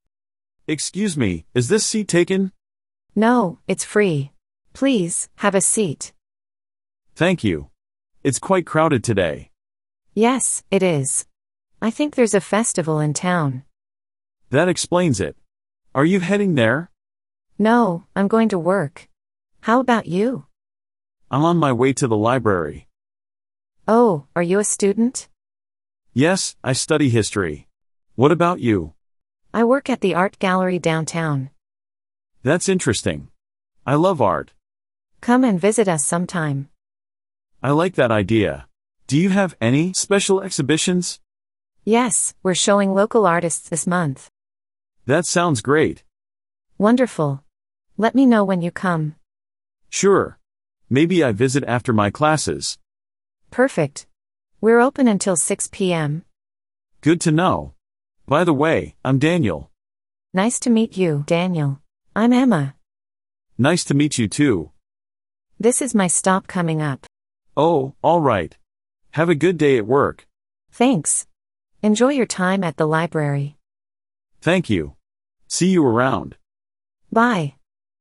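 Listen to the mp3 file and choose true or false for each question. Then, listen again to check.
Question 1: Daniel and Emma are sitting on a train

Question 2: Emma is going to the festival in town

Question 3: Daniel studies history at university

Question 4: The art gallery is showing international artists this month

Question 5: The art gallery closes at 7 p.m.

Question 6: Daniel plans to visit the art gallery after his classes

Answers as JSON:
{"1": "False", "2": "False", "3": "True", "4": "False", "5": "False", "6": "True"}

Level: Beginner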